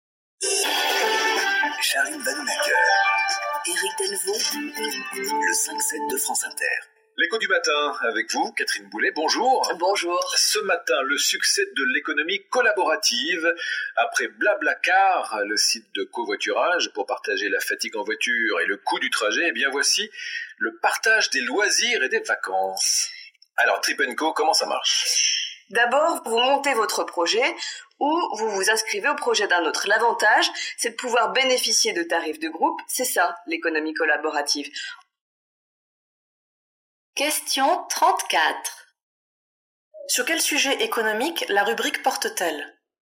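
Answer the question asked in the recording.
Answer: L'économie collaborative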